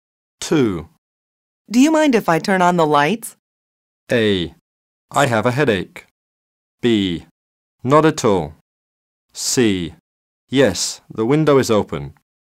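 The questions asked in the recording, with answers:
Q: Do you mind if I turn on the lights?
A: B: Not at all.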